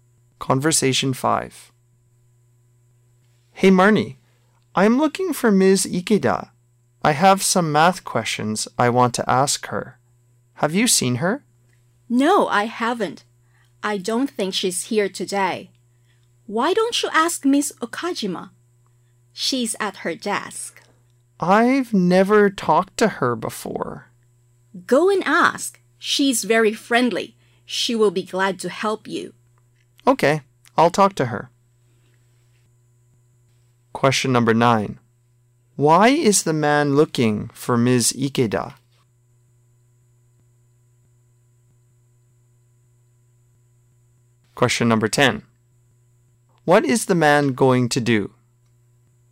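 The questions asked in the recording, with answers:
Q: Why is the man looking for Ms.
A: He has some math questions to ask her

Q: What is the man going to do?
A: Talk to Ms. Okajima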